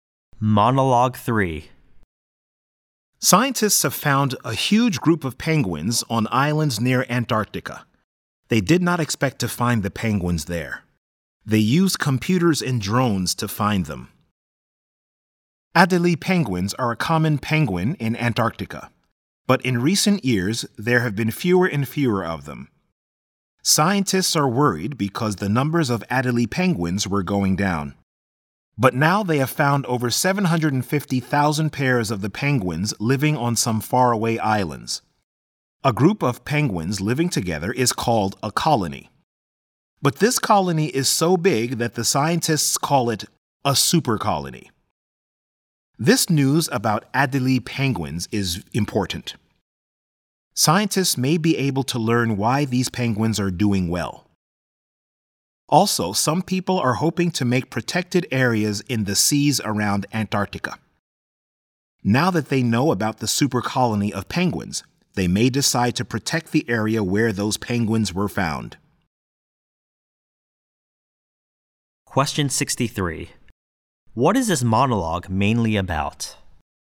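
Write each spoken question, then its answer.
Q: What is this monologue mainly about?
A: The discovery of a super colony of Adélie penguins near Antarctica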